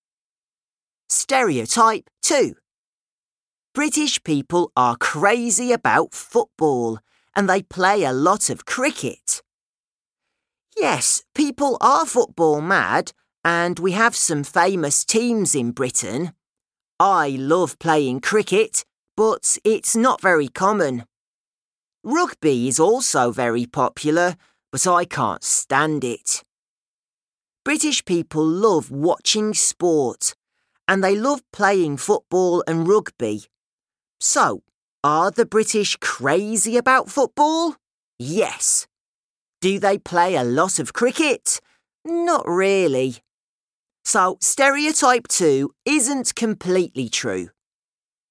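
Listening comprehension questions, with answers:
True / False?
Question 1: People are crasy about football.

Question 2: Playing cricket is not very common in England.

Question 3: Josh is mad about rugby.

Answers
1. True
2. True
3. False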